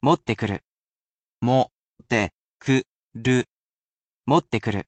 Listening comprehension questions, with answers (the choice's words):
Please choose the romanisation of the following word:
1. もってくる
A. mottekuru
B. iro wo nuru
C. okureru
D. ma ni au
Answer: mottekuru

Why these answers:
ヒント:この文に「しらない」は 「don't know」を意味します。 Hint: In this sentence,「しらない」means「don't know」.